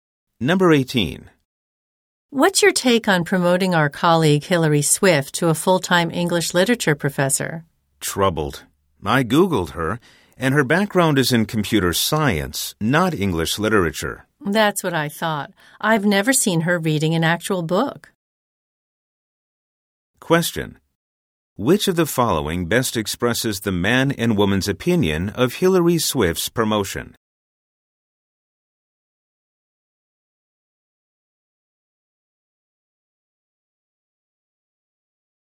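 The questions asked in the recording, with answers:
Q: Which of the following best expresses the man and woman's opinion of Hillary Swift's promotion?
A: They doubt she is qualified.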